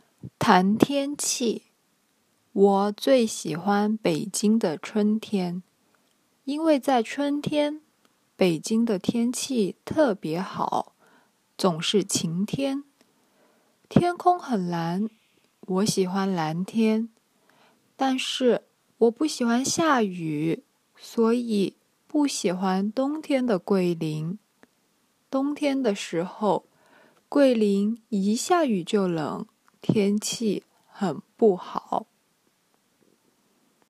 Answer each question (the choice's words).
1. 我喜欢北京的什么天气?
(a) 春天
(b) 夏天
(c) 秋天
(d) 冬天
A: 春天

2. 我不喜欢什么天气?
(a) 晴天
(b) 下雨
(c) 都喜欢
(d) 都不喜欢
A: 下雨

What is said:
我最喜欢北京的春天。因为在春天,北京的天气特别好,总是晴天,天空很蓝,我喜欢蓝天。但是我不喜欢下雨,所以不喜欢冬天的桂林。
但是我不喜欢下雨,所以不喜欢冬天的桂林。 冬天的时候,桂林一下雨就冷,天气很不好。